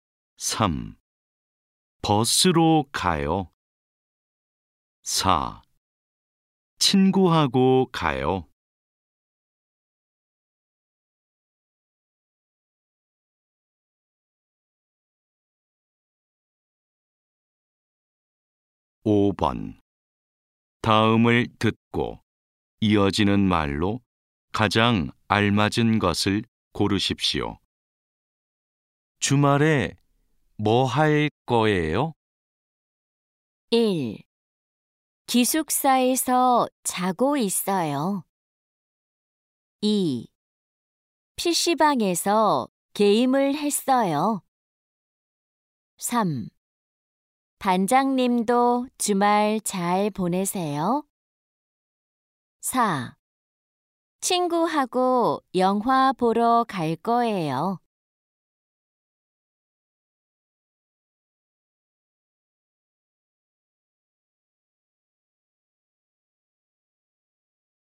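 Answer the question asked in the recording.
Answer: 4: 친구하고 영화 보러 갈 거예요.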